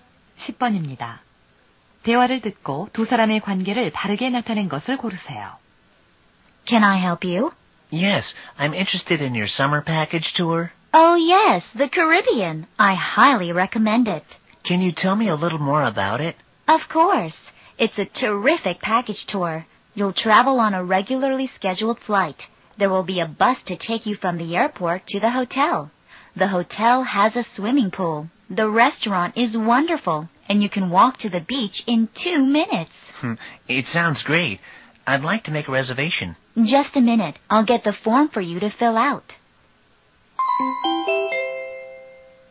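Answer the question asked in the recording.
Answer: 여행사 직원과 고객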